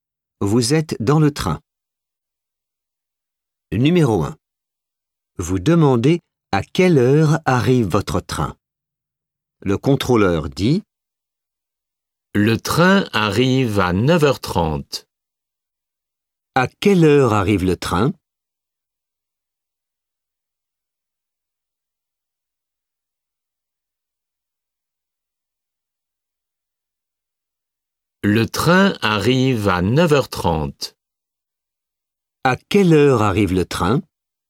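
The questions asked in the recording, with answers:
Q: À quelle heure arrive le train ?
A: 9h30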